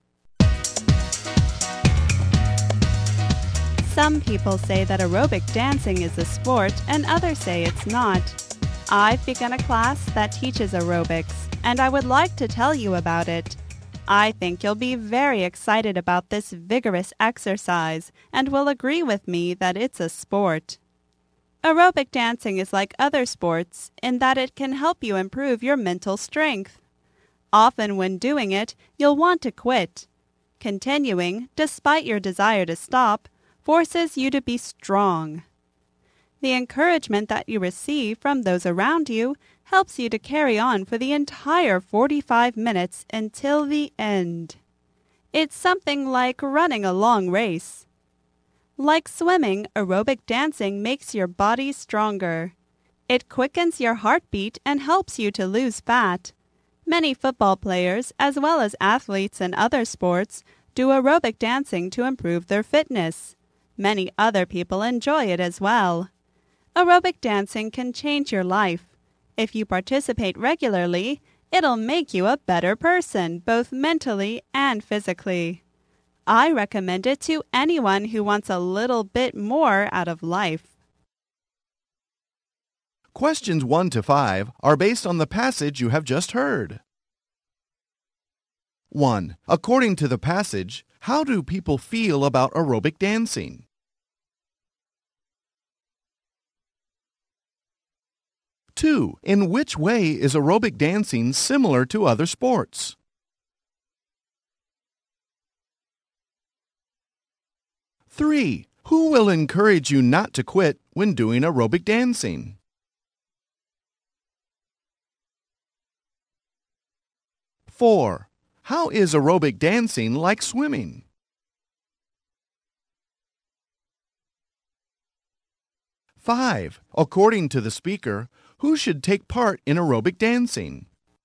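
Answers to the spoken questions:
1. Some say it is a sport and others say it's not
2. It improves mental strength
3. Those around you
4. It makes your body stronger
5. Anyone who wants a little more out of life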